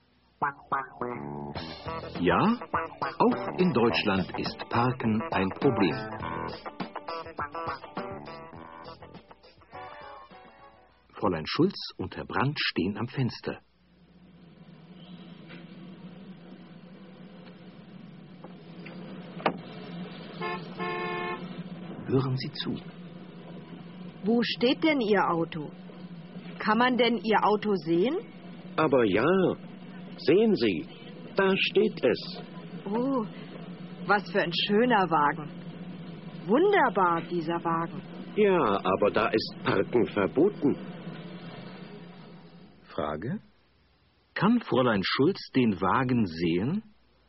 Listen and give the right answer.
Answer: Ja, sie kann den Wagen sehen.